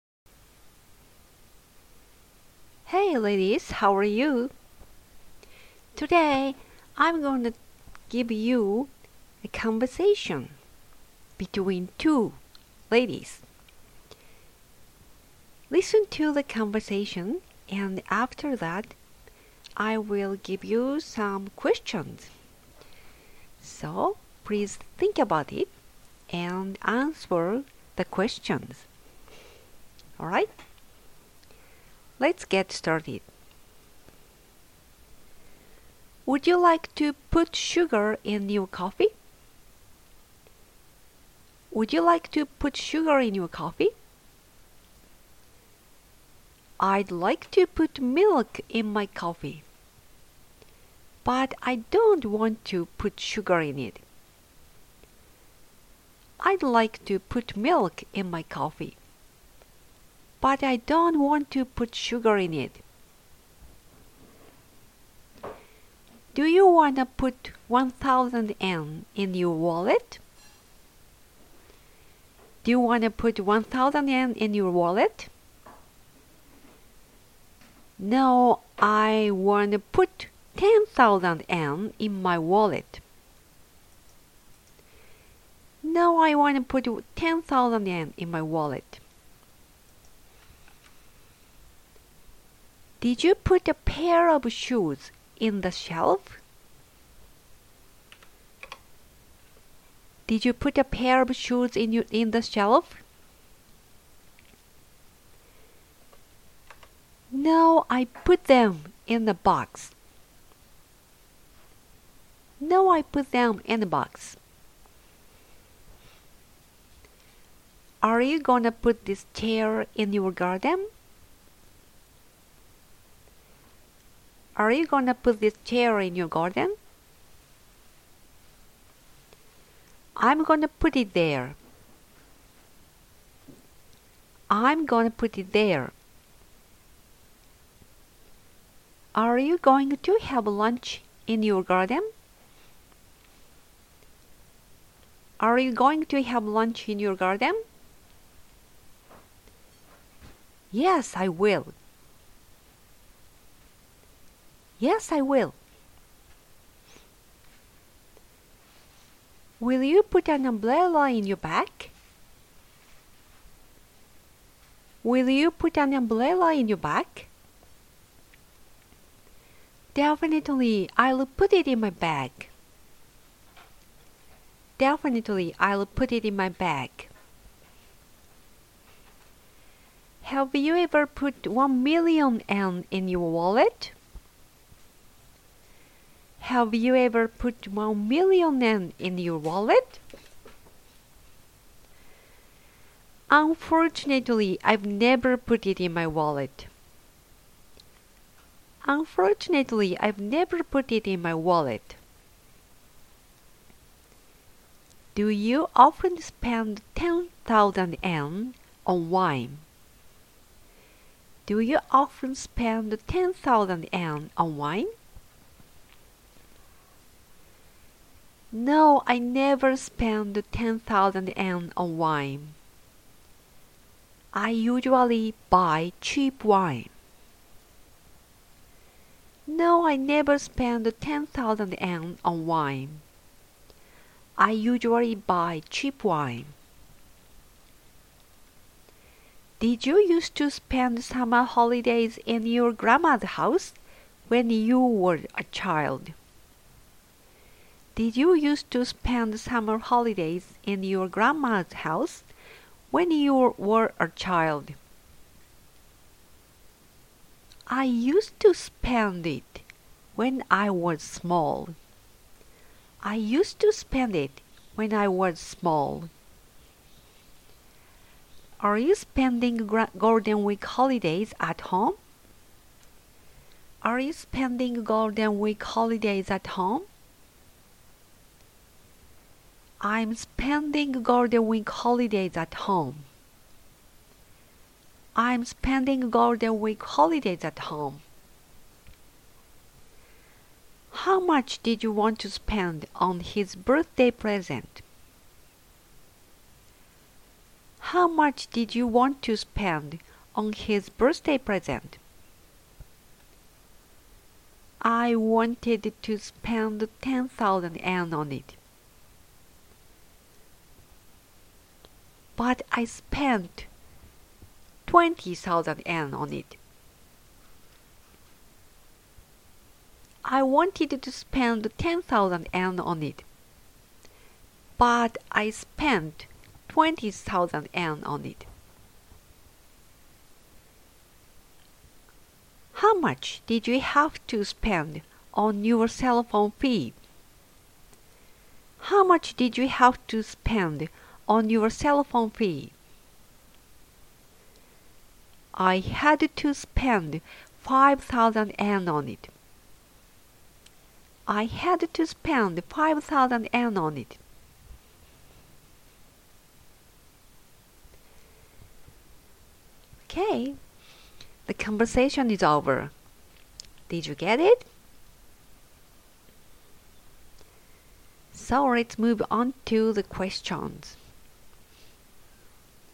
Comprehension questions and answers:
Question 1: Can you tell me about her favorite coffee?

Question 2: How much does she want to put in her wallet?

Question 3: Is she gonna put a chair in her garden and have lunch?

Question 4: Will she bring an umbrella?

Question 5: Has she put 1000,000 yen in her wallet?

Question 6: Does she usually buy expensive wine?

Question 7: Has she stayed in her grandmama's house?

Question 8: What is she gonna do during the GW holidays?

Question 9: How much did she spend on his present?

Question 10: How much is her cellphone fee?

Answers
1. She loves milk coffee. She doesn't like a sweet coffee.
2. She wants to put 10,000 yen in her wallet.
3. Yes, she will have lunch in the garden.
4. Yes, she will.
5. She has never put 1000,000 yen in her wallet.
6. She usually buys cheap wine.
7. Yes, she has stayed there. She used to stay there during the summer holidays.
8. She is gonna stay home.
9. She spent 20,000 yen on it.
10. It's 5,000 yen.

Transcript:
A B Would you like to put sugar in your coffee? I'd like to put milk in my coffee, but I don't want to put sugar in it. Do you wanna put 1000 yen in your wallet? NO, I wanna put 10,000 yen in my wallet. Did you put a pair of shoes in the shelf? No, I put them in a box. Are you gonna put this chair in your garden? I'm gonna put it there. Are you going to have lunch in your garden? Yes, I will. Will you put an umbrella in your bag? Definitely, I'll put it in my bag. Unfortunately, I've never put it in my wallet. Do you often spend 10,000 yen on wine? No, I never spend 10,000 yen on wine. I usually buy cheap wine. Did you used to spend summer holidays in your granma's house when you were a child? I used to spend it when I was small. Are you spending the GW holidays at home? I'm spending the GW holidays at home. How much did you want to spend on his birthday present? I wanted to spend 10,000 yen on it. But I spent 20,000 yen on it. How much did you have to spend on your cellphone fee?